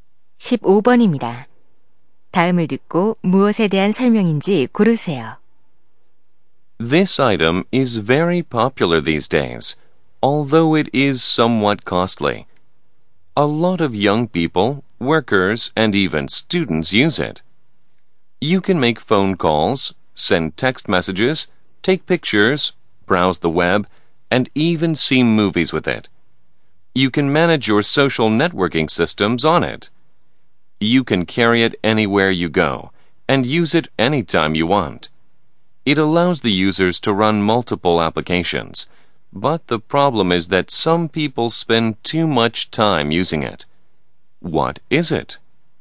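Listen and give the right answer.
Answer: 스마트폰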